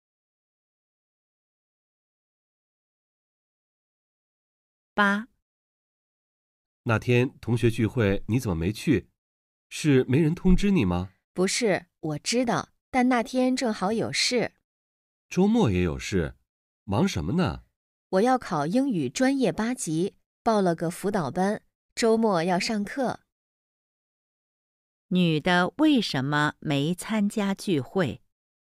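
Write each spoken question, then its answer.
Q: 女的为什么没参加聚会?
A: 周末要上英语专八辅导班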